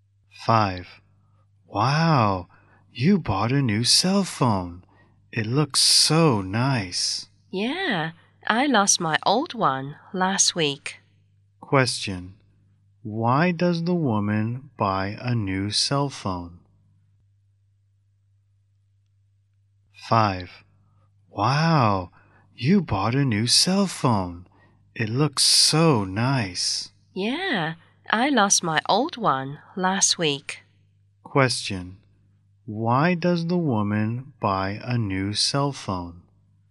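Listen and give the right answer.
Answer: She lost her old one last week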